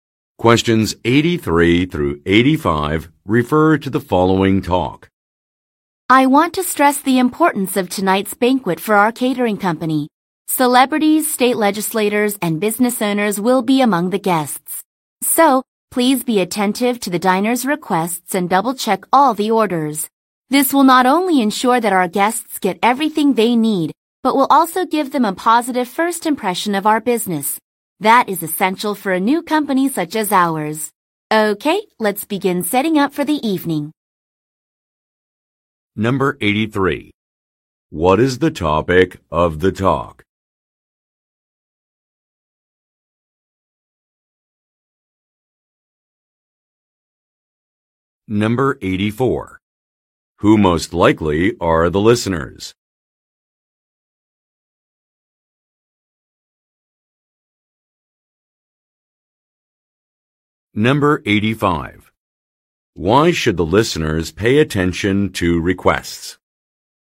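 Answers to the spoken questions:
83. Tonight's banquet for the catering company
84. Catering staff (servers)
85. To give guests a good first impression of the new company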